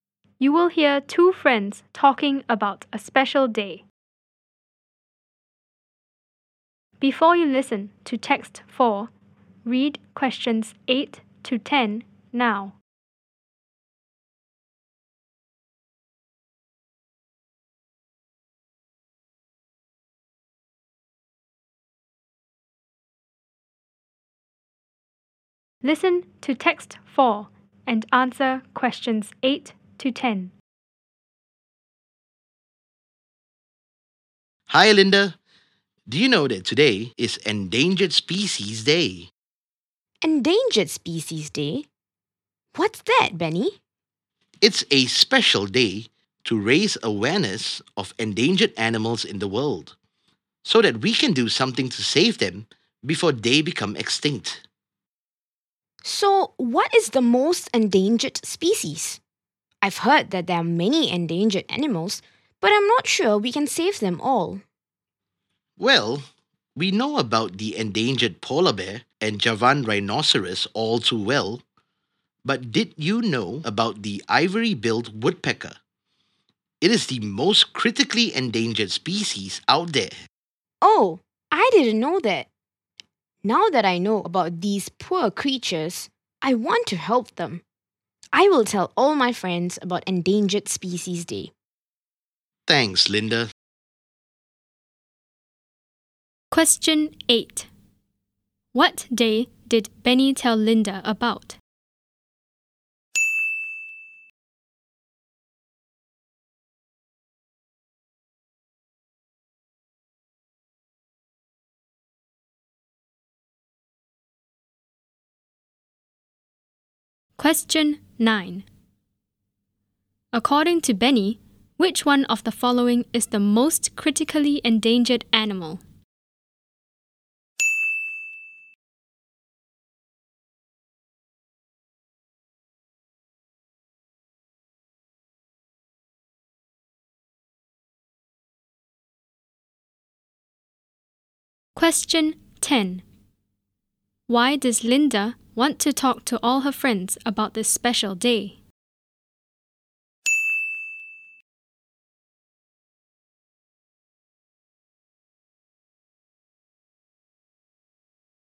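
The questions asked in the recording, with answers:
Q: What day did Benny tell Linda about?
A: Endangered Species Day

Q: According to Benny, which one of the following is the most critically endangered animal?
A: The ivory-billed woodpecker

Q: Why does Linda want to talk to all her friends about this special day?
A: She wants to help the endangered animals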